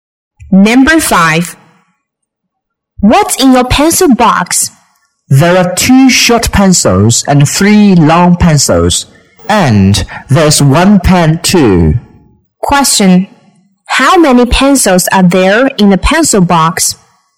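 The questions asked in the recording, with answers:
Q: How many pencils are there in the pencil box?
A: Five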